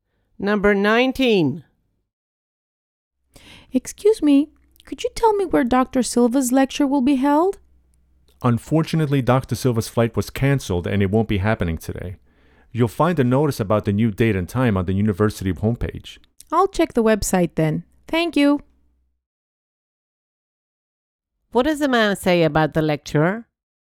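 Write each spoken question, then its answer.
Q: What does the man say about the lecture?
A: It is cancelled today because Dr. Silva's flight was cancelled; the new date will be on the university homepage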